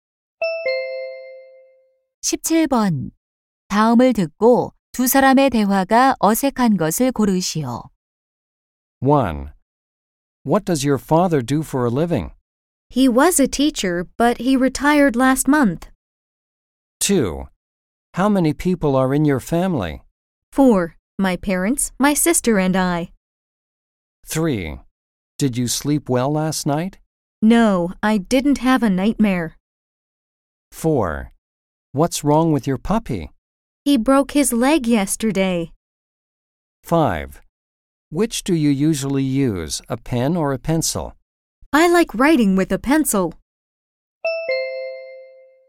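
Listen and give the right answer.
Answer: 3: Did you sleep well last night? No, I didn't have a nightmare.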